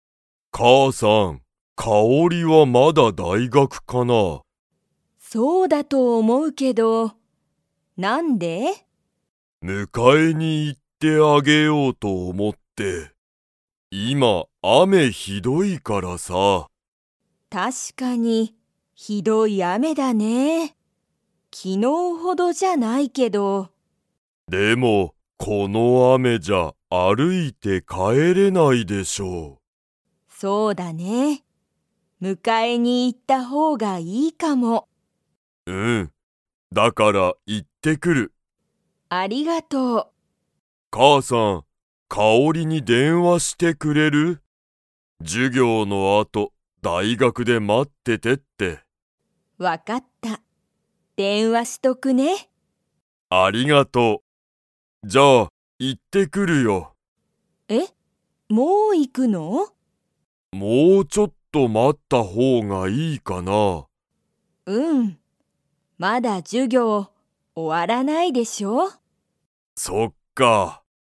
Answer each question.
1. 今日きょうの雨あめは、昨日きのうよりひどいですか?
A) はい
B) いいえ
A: B) いいえ

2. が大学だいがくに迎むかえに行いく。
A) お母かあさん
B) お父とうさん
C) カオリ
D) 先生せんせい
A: B) お父とうさん

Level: Level 3

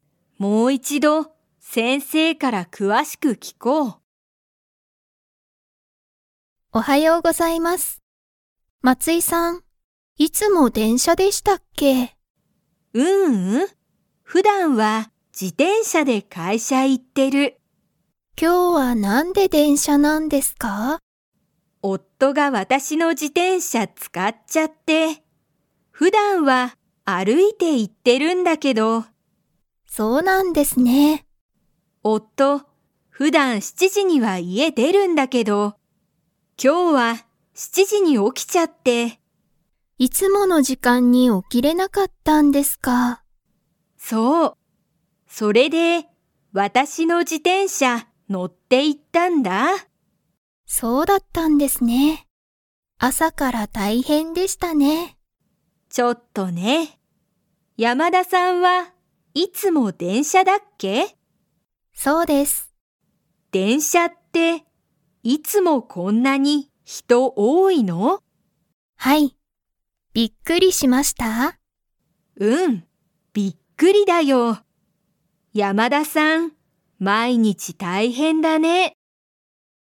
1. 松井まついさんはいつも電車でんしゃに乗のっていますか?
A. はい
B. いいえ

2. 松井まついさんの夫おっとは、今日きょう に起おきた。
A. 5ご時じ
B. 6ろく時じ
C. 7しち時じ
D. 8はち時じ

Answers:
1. B. いいえ
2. C. 7しち時じ

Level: Level 3

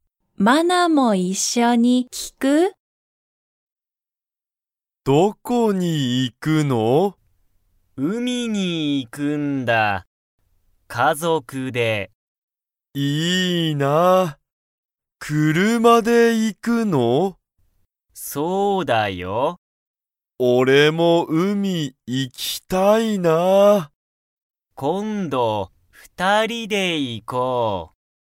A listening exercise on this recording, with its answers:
ユウタは、家族(かぞく)と____に行(い)く。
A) 車(くるま)の店(みせ)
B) 二人(ふたり)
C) 海(うみ)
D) ケンの家(いえ)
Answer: C) 海(うみ)

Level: Level 1

